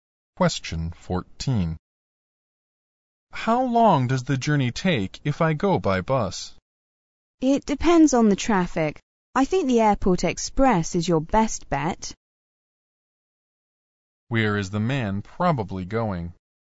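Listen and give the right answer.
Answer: To the airport.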